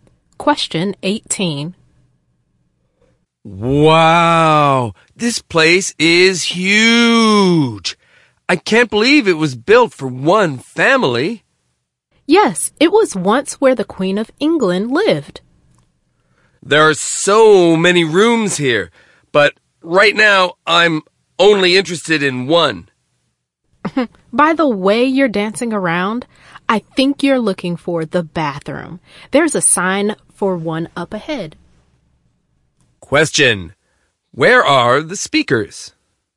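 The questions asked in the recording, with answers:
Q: Where are the speakers?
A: In a palace where the Queen of England once lived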